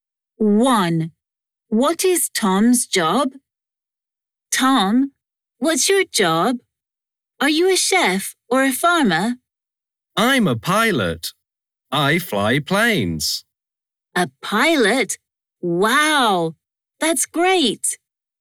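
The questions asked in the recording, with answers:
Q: What is Tom's job?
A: a pilot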